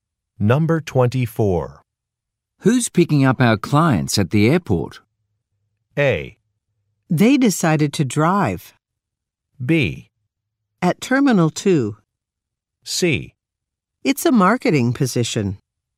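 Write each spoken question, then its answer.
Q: Who's picking up our clients at the airport?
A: A: They decided to drive.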